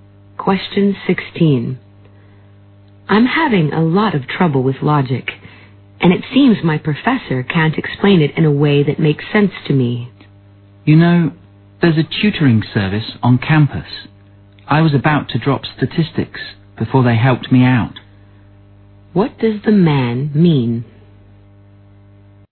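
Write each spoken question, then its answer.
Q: What does the man mean?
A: The woman should try the campus tutoring service; it helped him with statistics.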